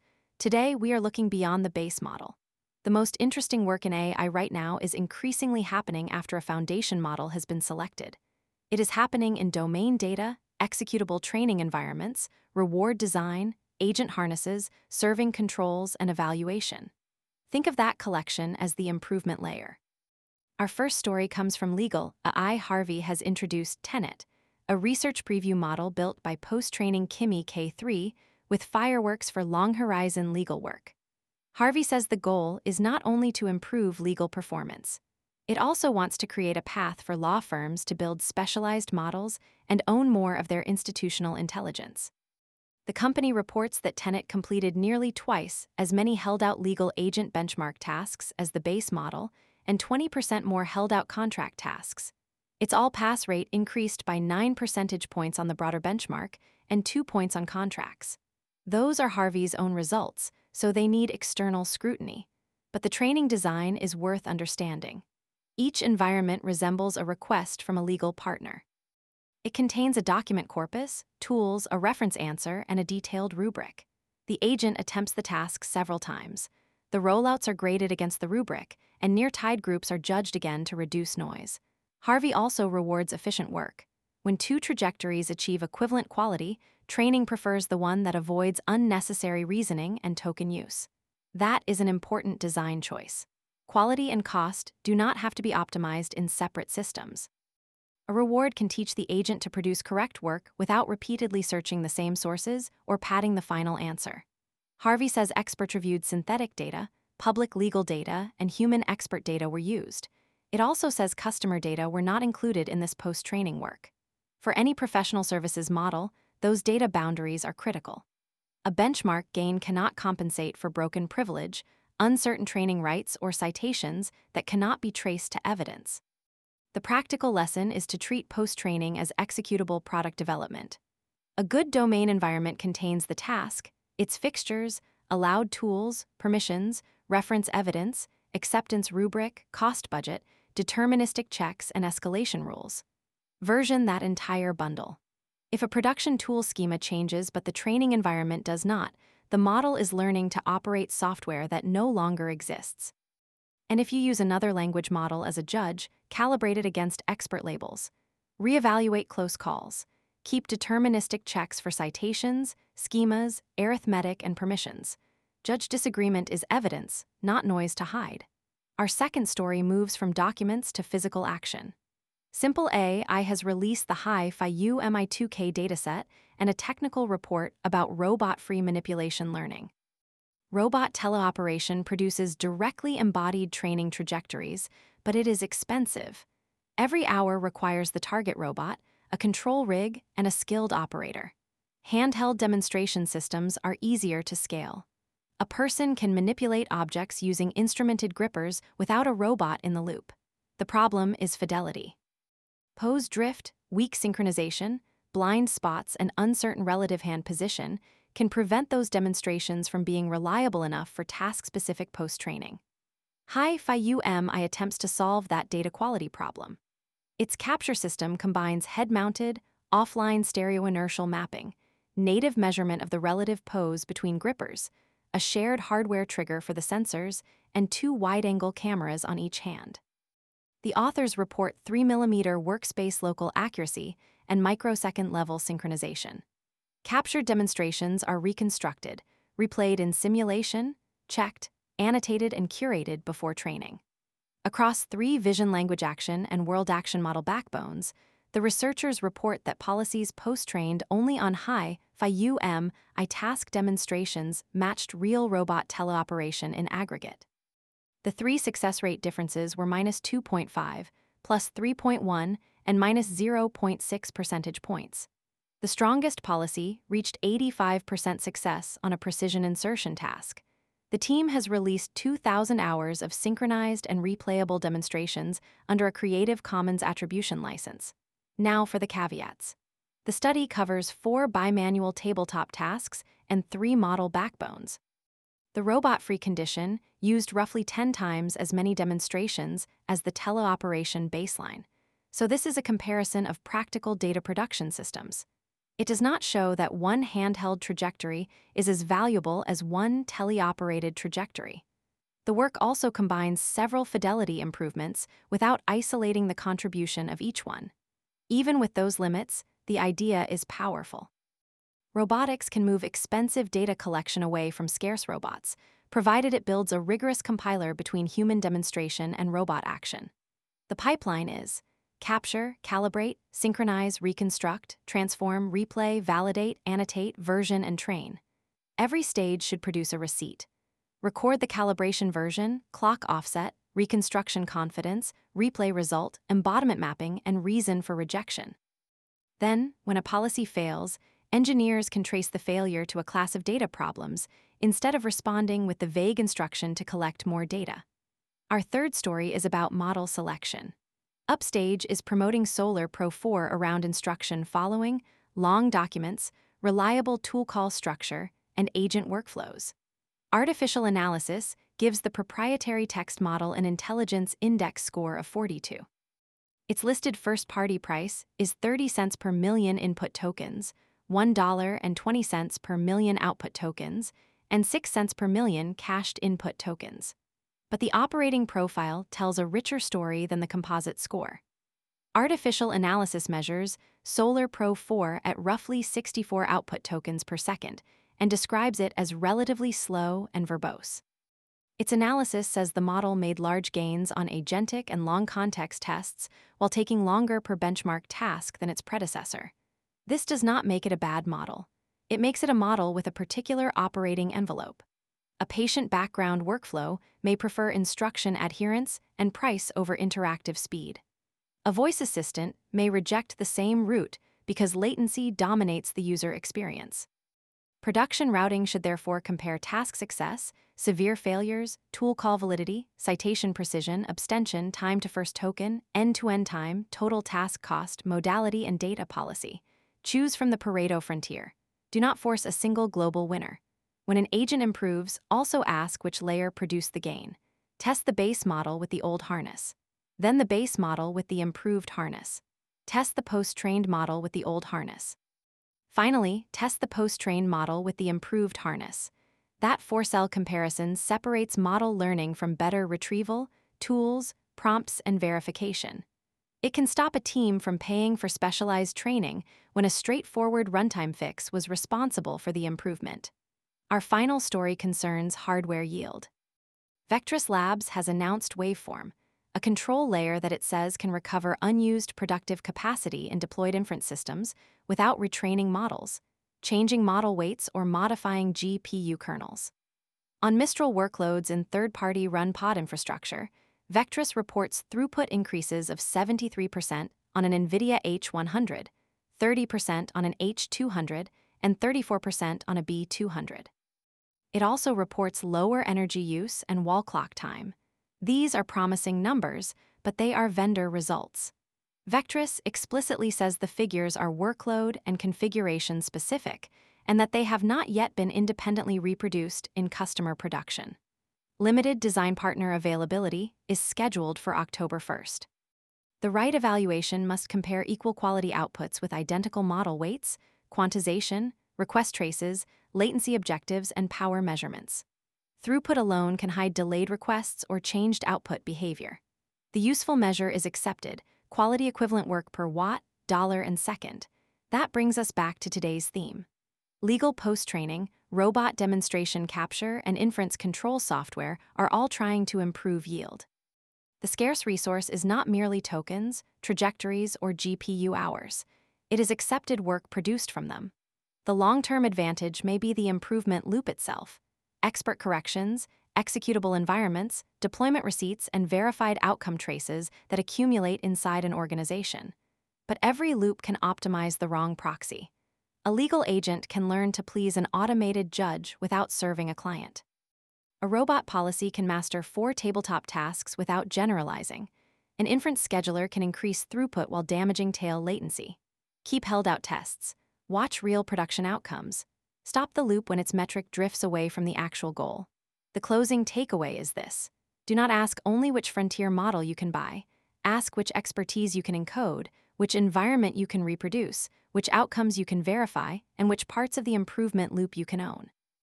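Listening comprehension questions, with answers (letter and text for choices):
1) What base model did Harvey use for the Tenet legal post-training research preview?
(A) Kimi K3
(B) Solar Pro 4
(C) GPT-4o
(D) Llama 3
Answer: (A) Kimi K3

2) What is the central claim tested by HiFi-UMI?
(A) Every robot can learn from text alone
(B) High-fidelity robot-free demonstrations can support task post-training without a real-robot teleoperation anchor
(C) Simulation should replace all physical evaluation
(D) More model parameters eliminate the need for demonstrations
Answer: (B) High-fidelity robot-free demonstrations can support task post-training without a real-robot teleoperation anchor

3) Why is one composite model benchmark insufficient for production routing?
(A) Benchmarks never contain numbers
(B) Every model has the same latency and price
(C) Workflows value different combinations of quality, latency, cost, reliability, modality, and policy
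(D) Only parameter count matters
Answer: (C) Workflows value different combinations of quality, latency, cost, reliability, modality, and policy

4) What does the four-cell model-and-harness evaluation separate?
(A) Model-learning gains from improvements in retrieval, tools, prompts, and verifiers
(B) Training data from test data by deleting both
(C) GPU memory from system memory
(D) Open-source licences from commercial licences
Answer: (A) Model-learning gains from improvements in retrieval, tools, prompts, and verifiers

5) How should teams interpret Vectris's published Waveform performance figures today?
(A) As guaranteed gains for every model and GPU fleet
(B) As an independently established industry standard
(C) As irrelevant because serving software cannot affect efficiency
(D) As promising, workload-specific vendor results awaiting independent production reproduction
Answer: (D) As promising, workload-specific vendor results awaiting independent production reproduction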